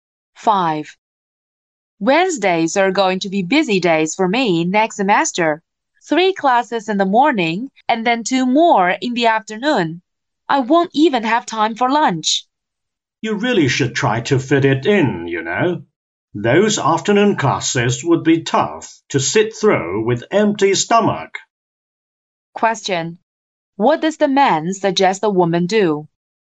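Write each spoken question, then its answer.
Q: What does the man suggest the woman do?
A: Make time to eat lunch.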